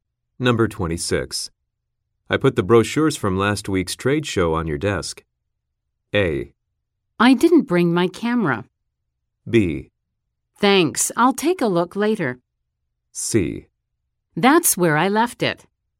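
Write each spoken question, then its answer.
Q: I put the brochures from last week's trade show on your desk.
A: B: Thanks, I'll take a look later.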